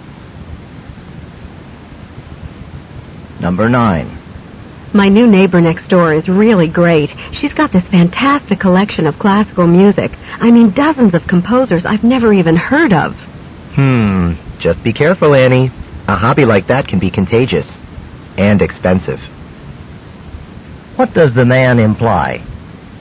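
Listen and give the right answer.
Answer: Annie may start collecting music too and spend a lot of money.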